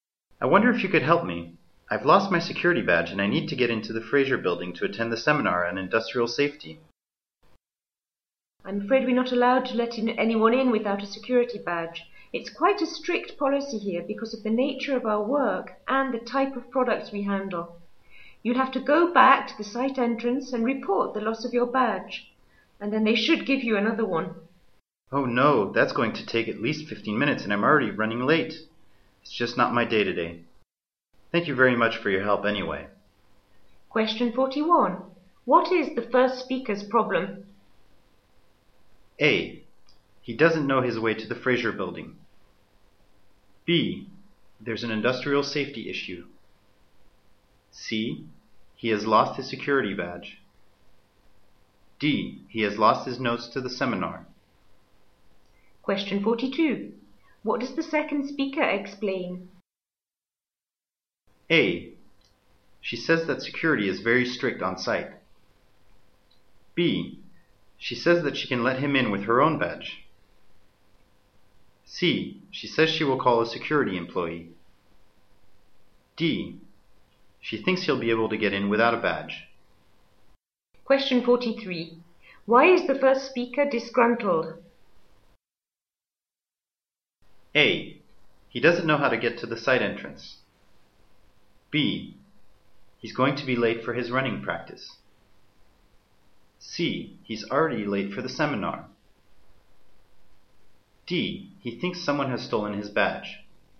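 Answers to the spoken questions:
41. C: He has lost his security badge.
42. A: She says that security is very strict on site.
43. C: He's already late for the seminar.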